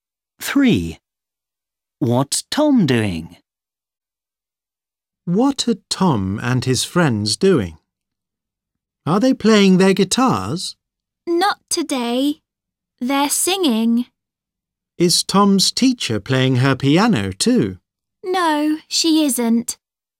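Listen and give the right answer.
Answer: singing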